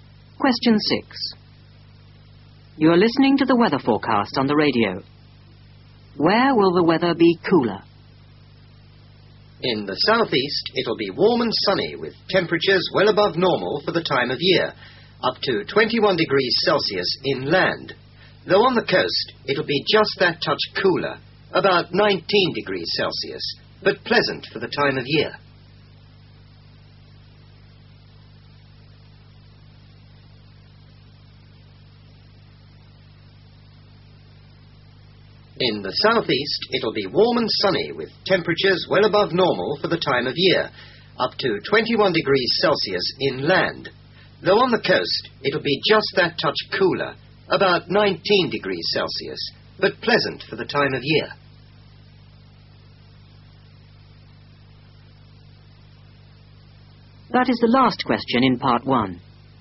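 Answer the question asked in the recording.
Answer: On the coast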